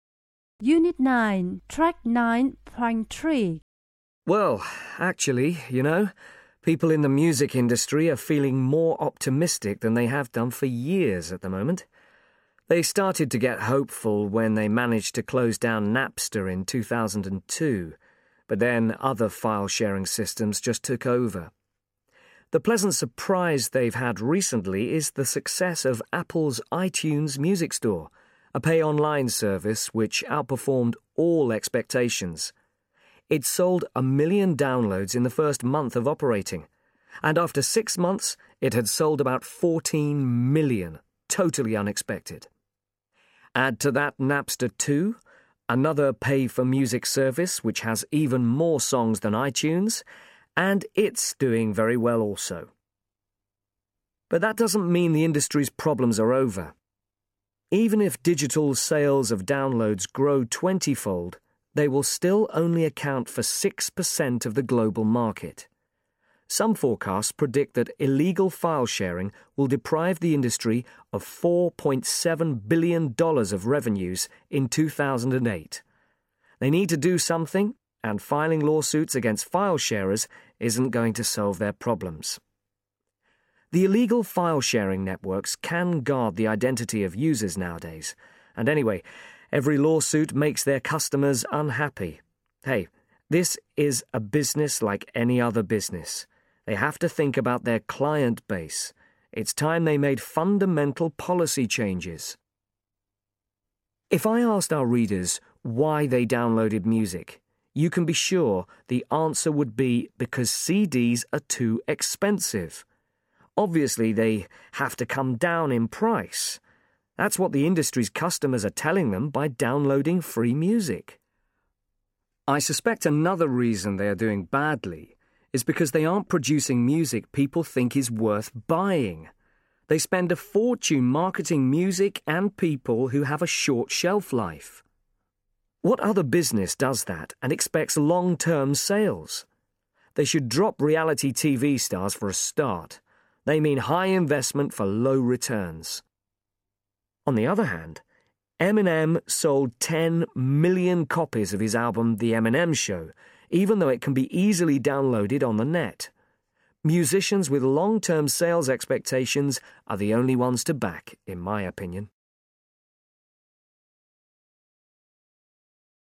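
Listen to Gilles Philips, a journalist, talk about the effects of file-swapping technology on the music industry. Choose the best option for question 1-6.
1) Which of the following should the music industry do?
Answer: Bring down CD prices and stop backing artists with a short shelf life, such as reality TV stars.

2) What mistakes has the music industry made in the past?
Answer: It has concentrated too much on short-term profit.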